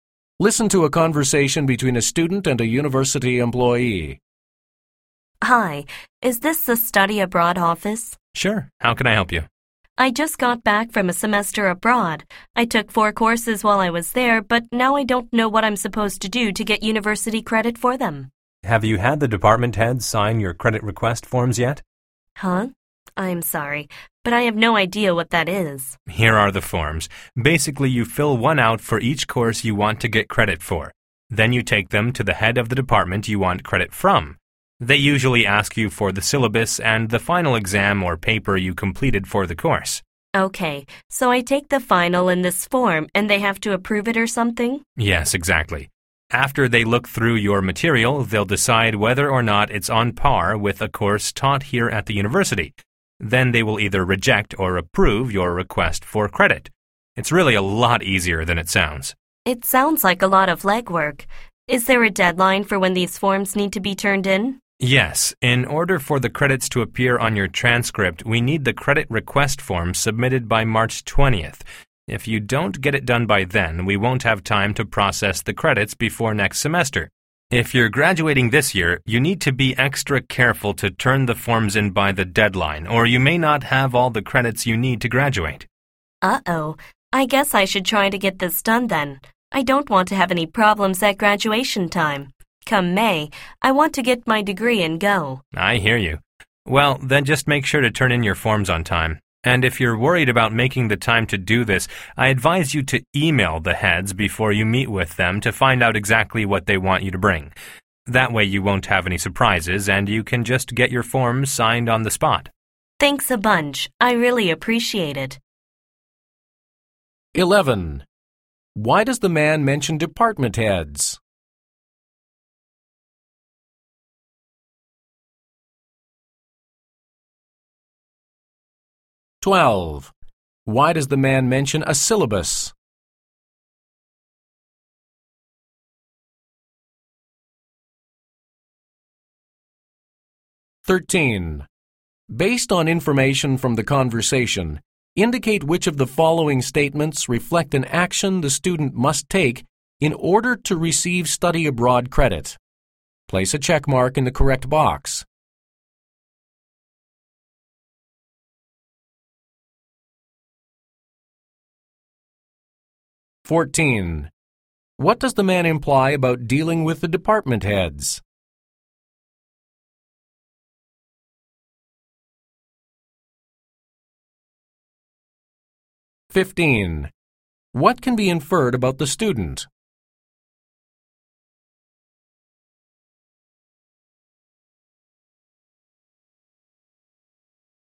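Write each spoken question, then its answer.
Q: Why does the man mention department heads?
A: Because the department heads must sign and approve the credit request forms

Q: Why does the man mention a syllabus?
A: Because department heads usually ask for it to decide whether the course matches one at the university

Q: What does the man imply about dealing with the department heads?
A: Emailing them first to ask what to bring avoids surprises, so the forms can be signed on the spot

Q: What can be inferred about the student?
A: The student plans to graduate this May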